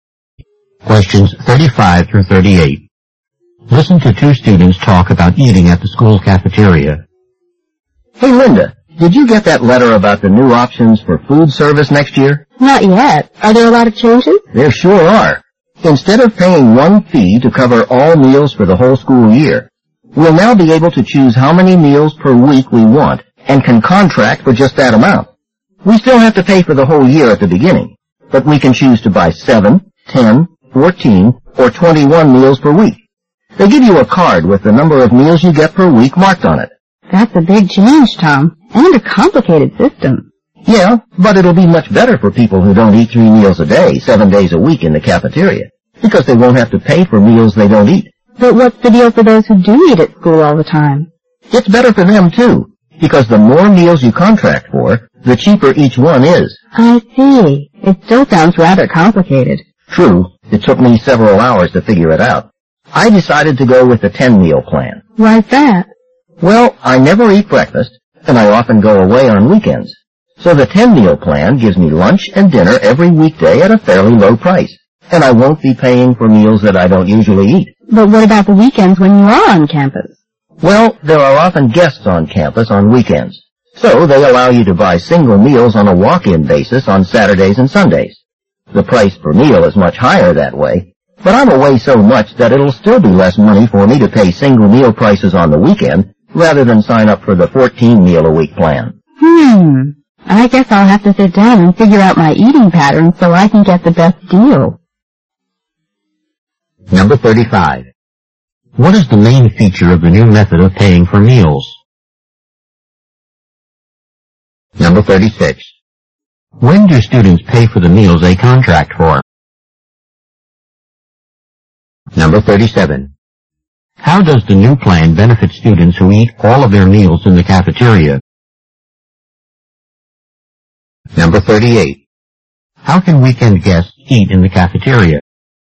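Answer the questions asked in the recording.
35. Students choose how many meals per week to pay for
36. At the beginning of the year
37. Each meal costs less
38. By buying single meals on a walk-in basis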